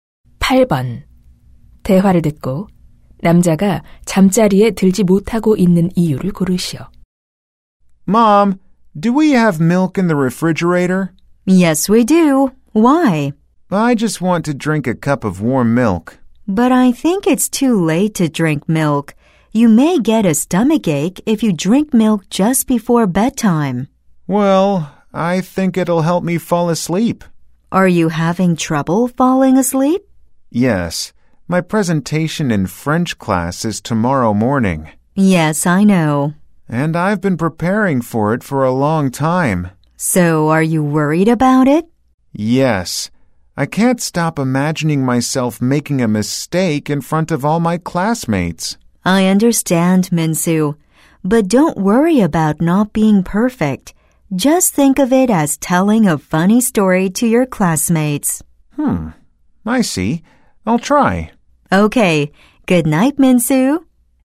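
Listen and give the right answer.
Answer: 내일 아침 프랑스어 발표가 걱정되어서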